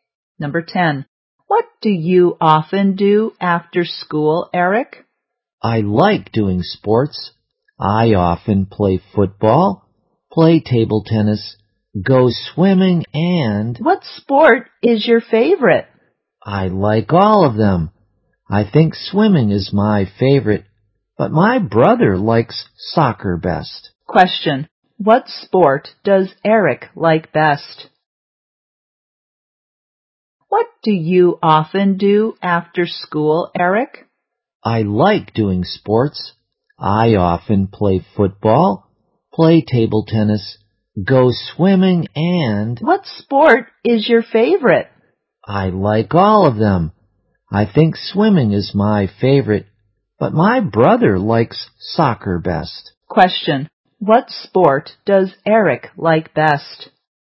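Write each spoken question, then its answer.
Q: What sport does Eric like best?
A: Swimming.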